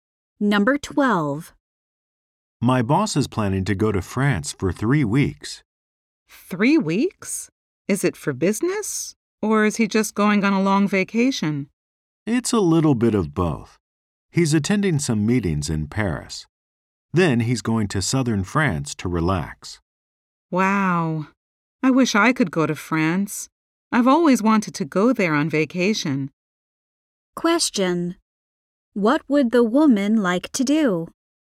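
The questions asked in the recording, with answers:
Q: What would the woman like to do?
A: Go to France on vacation.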